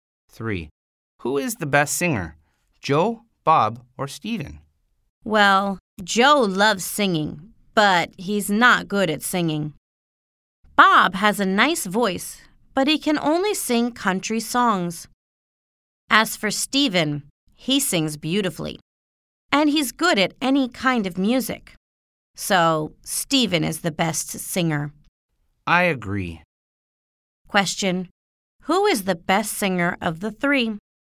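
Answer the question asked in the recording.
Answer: Steven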